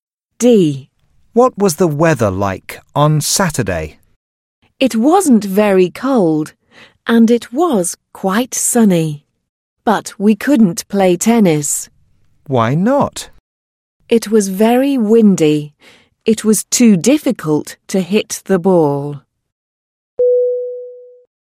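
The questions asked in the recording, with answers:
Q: What was the weather like on Saturday?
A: Very windy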